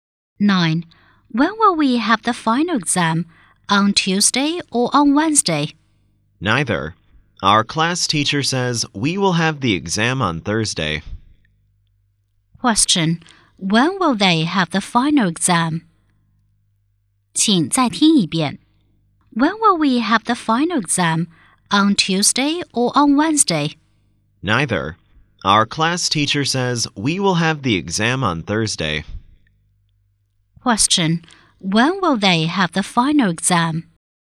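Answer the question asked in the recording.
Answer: On Thursday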